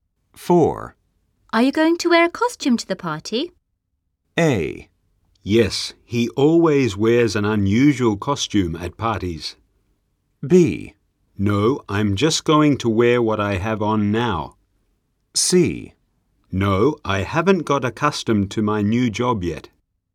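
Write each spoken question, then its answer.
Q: Are you going to wear a costume to the party?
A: B: No, I'm just going to wear what I have on now.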